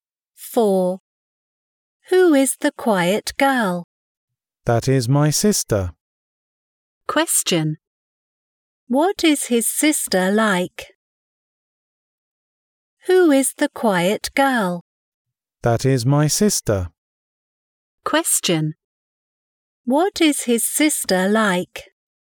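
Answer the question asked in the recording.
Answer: She is quiet.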